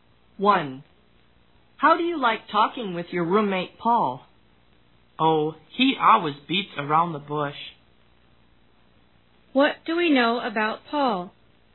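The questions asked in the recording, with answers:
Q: What do we know about Paul?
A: He never gets straight to the point when he talks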